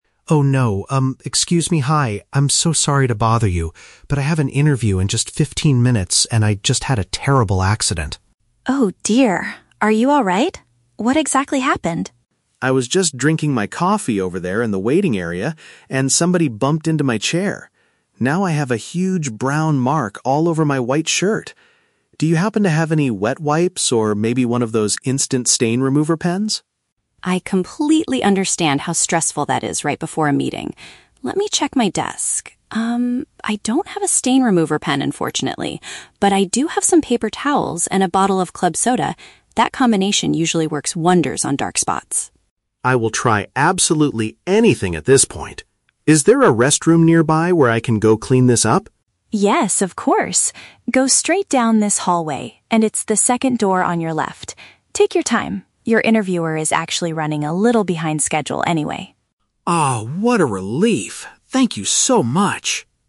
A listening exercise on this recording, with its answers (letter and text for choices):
Listen to a conversation between a job candidate and a receptionist at an office lobby. Choose the correct answer (A, B, or C) for each question.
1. How did the candidate's shirt get dirty?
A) He dropped his cup while walking to the interview room.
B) Another person hit the seat he was resting in.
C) The receptionist accidentally spilled a drink on him.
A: B) Another person hit the seat he was resting in.

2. What does the receptionist give to the candidate to clean his clothes?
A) An instant stain remover pen.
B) A packet of wet wipes.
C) Some carbonated water and tissues.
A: C) Some carbonated water and tissues.

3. Why shouldn't the candidate be overly worried about the time?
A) The manager conducting the interview is delayed.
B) The interview is not supposed to start for another hour.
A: A) The manager conducting the interview is delayed.

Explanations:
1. The candidate says "somebody bumped into my chair" while he was in the waiting area. "Hit the seat" is a paraphrase for bumping into a chair.
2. The receptionist gives him "paper towels and a bottle of club soda". This is paraphrased as "tissues" (paper towels) and "carbonated water" (club soda).
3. The receptionist tells him "your interviewer is actually running a little behind schedule." This means the manager is delayed.

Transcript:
Candidate: Oh no! Um, excuse me, hi. I'm so sorry to bother you, but I have an interview in just fifteen minutes and I just had a terrible accident.
Receptionist: Oh dear, are you alright? What exactly happened?
Candidate: I was just drinking my coffee over there in the waiting area, and somebody bumped into my chair. Now I have a huge brown mark all over my white shirt! Do you happen to have any wet wipes or maybe one of those instant stain remover pens?
Receptionist: I completely understand how stressful that is right before a meeting. Let me check my desk... Um, I don't have a stain remover pen, unfortunately. But I do have some paper towels and a bottle of club soda. That combination usually works wonders on dark spots.
Candidate: I will try absolutely anything at this point! Is there a restroom nearby where I can go clean this up?
Receptionist: Yes, of course. Go straight down this hallway, and it's the second door on your left. Take your time, your interviewer is actually running a little behind schedule anyway.
Candidate: Oh, what a relief. Thank you so much!